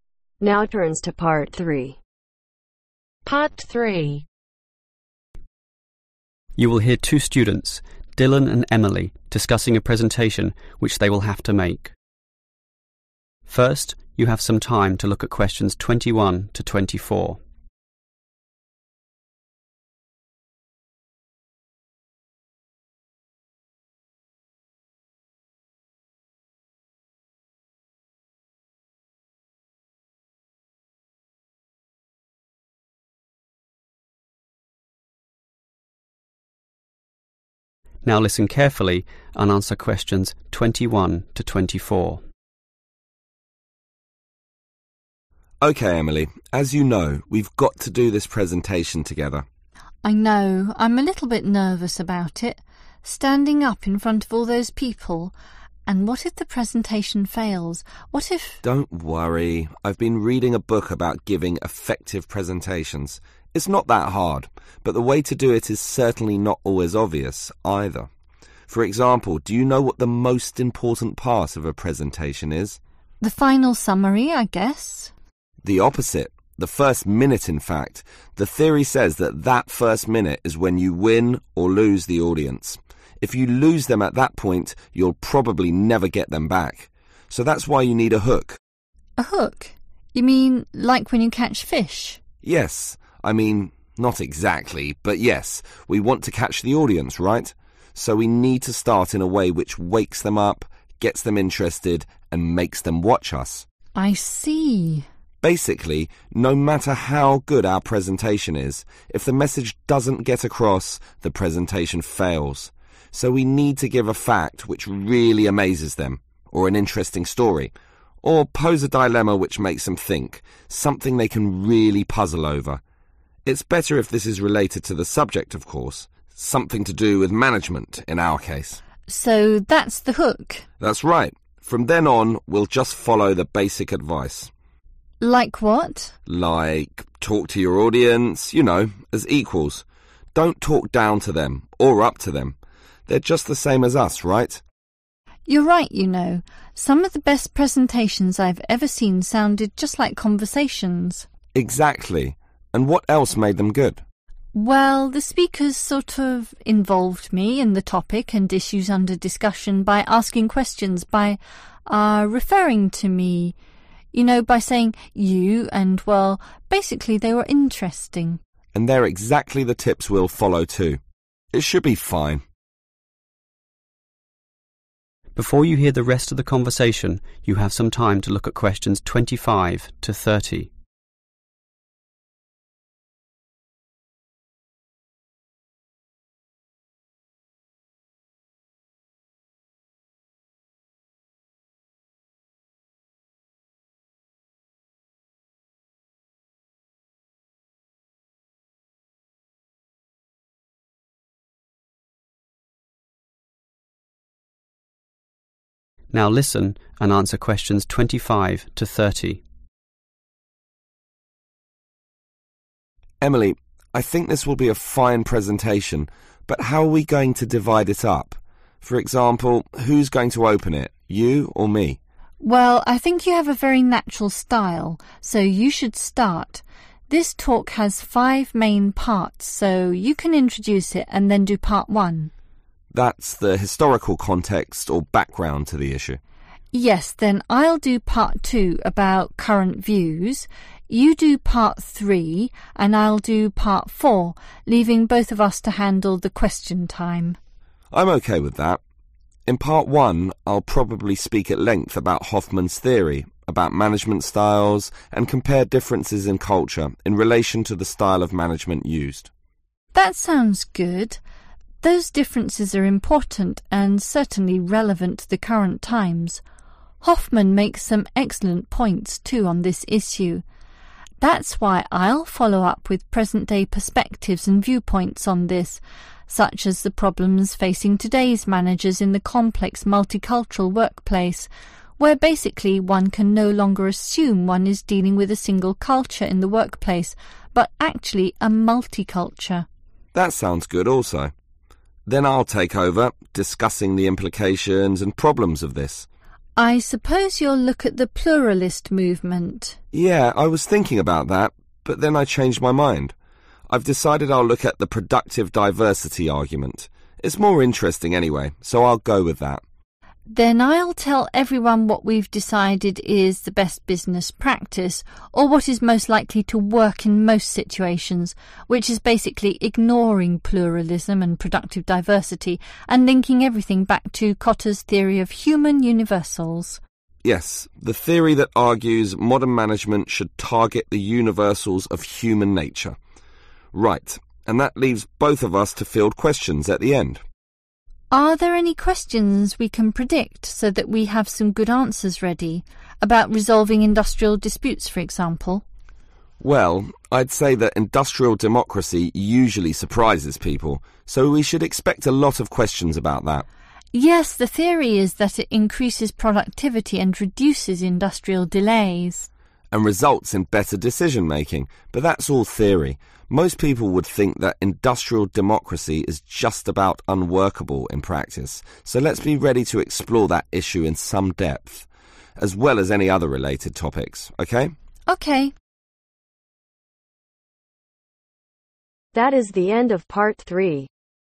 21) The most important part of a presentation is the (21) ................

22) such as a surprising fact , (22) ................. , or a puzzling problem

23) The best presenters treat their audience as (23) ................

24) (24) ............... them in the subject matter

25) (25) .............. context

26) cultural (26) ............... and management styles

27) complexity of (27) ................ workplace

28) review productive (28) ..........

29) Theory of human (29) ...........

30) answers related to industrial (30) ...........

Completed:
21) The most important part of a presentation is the first minute
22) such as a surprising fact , interesting story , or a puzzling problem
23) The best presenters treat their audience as equals
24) involve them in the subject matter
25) historical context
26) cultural differences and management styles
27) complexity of multicultural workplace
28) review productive Diversity
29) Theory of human Universals
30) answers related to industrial democracy